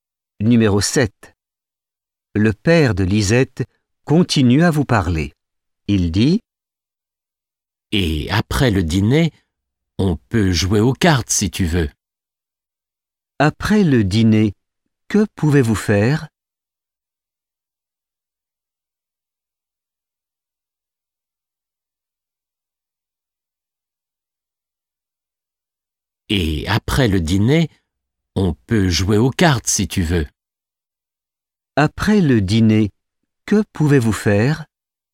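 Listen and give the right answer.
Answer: Jouer aux cartes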